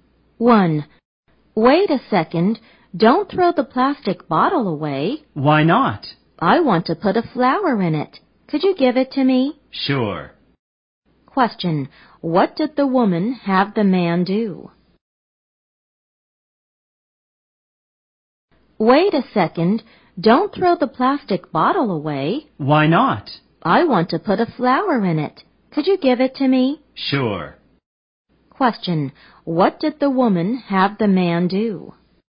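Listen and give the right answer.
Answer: Give her the plastic bottle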